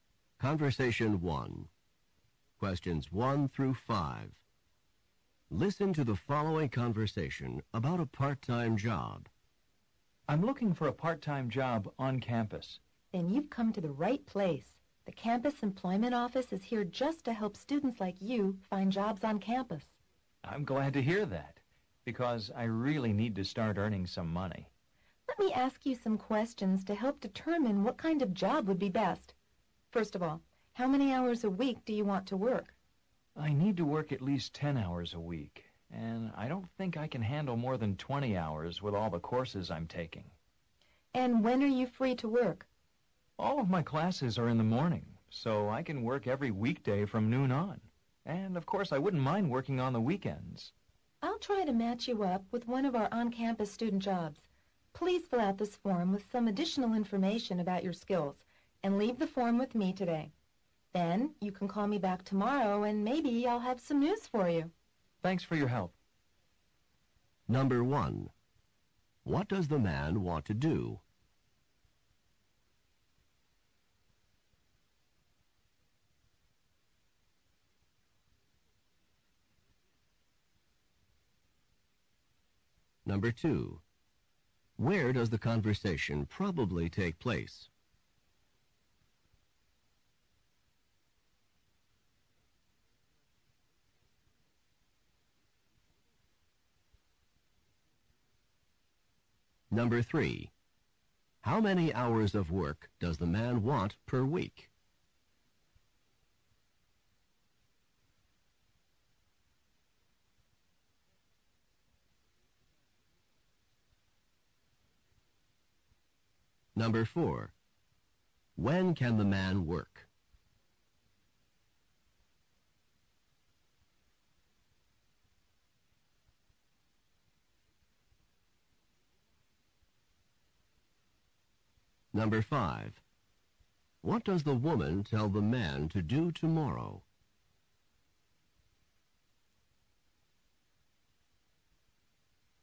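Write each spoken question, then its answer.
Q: What does the man want to do?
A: Get a part-time job on campus

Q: Where does the conversation probably take place?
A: In the campus employment office

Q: How many hours of work does the man want per week?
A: Between 10 and 20 hours

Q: When can the man work?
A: Weekday afternoons from noon on, and weekends

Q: What does the woman tell the man to do tomorrow?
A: Call her back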